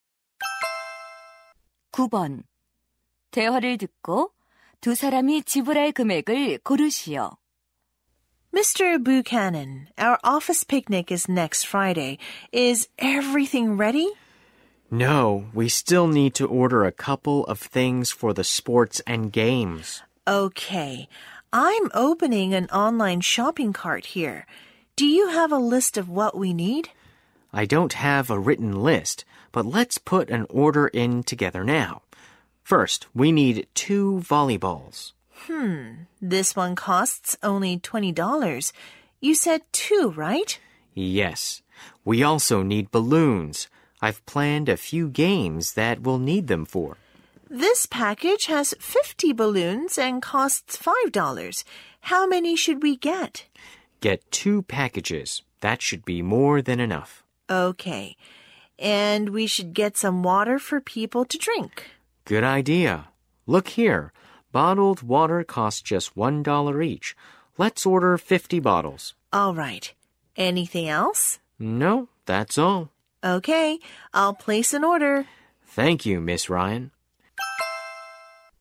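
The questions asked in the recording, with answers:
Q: 대화를 듣고 두 사람이 지불할 금액을 고르시오.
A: $100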